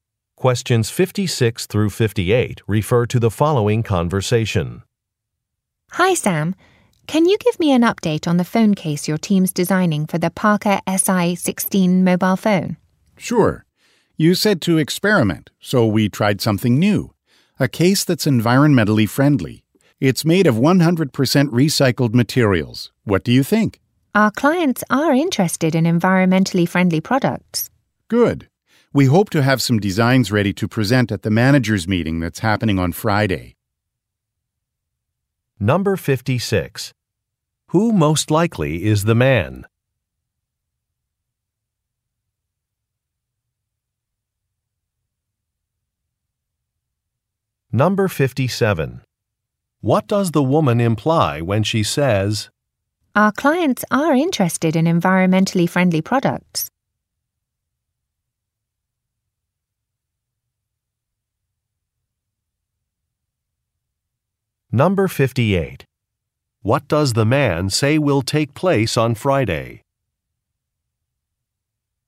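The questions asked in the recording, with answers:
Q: Who most likely is the man?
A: A phone case designer (product designer)

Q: What does the man say will take place on Friday?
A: A managers' meeting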